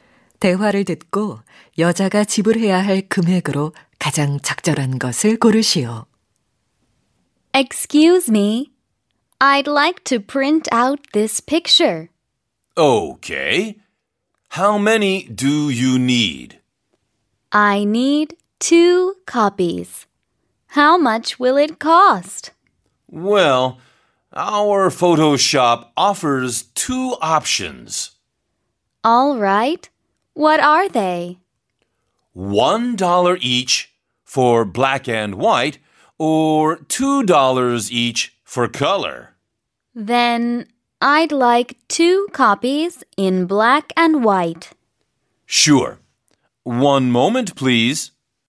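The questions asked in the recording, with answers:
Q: 대화를 듣고 여자가 지불해야 할 금액으로 가장 적절한 것을 고르시오.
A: 2달러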